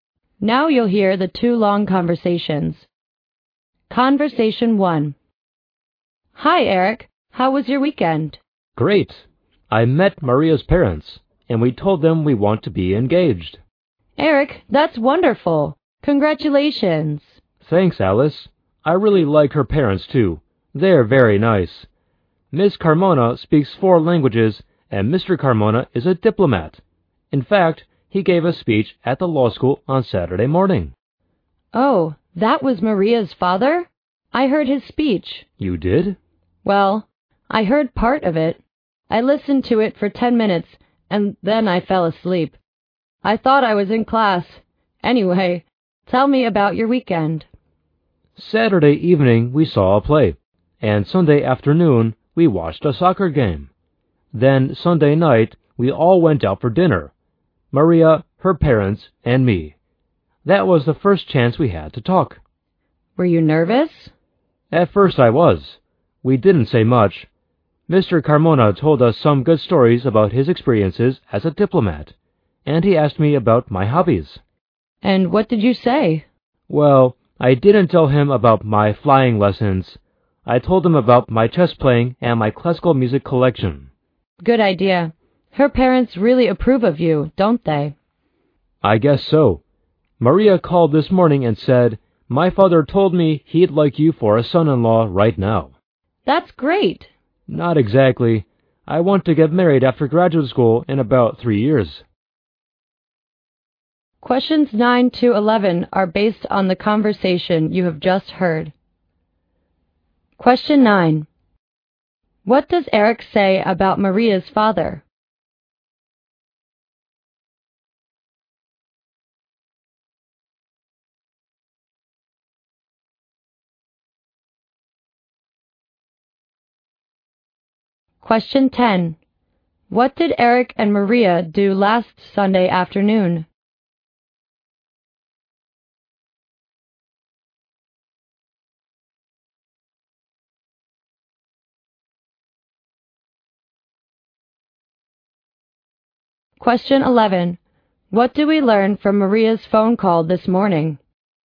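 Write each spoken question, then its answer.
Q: What does Eric say about Maria's father?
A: He is a diplomat who gave a speech at the law school.

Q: What did Eric and Maria do last Sunday afternoon?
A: They watched a soccer game.

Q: What do we learn from Maria's phone call this morning?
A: Her father would like Eric as a son-in-law right now.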